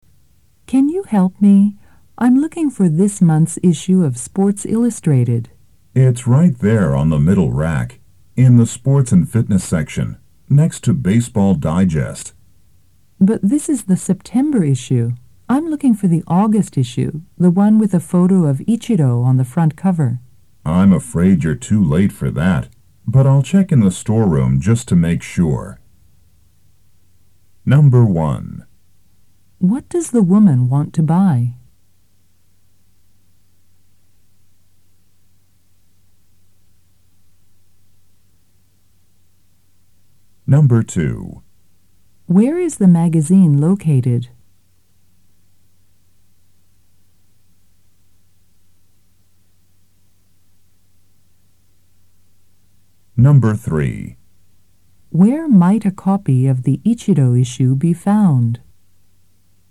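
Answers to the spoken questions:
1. The August issue of Sports Illustrated with Ichiro on the cover
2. On the middle rack in the Sports and Fitness section, next to Baseball Digest
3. In the storeroom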